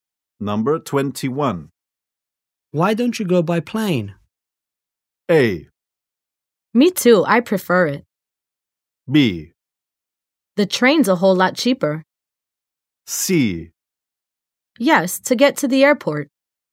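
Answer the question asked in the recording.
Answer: B: The train's a whole lot cheaper.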